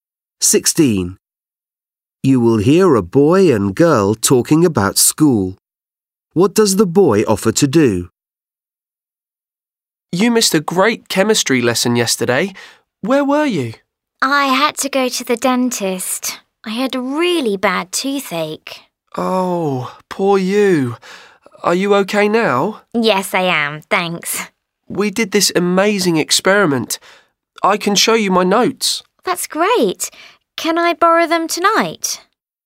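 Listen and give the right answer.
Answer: show her his notes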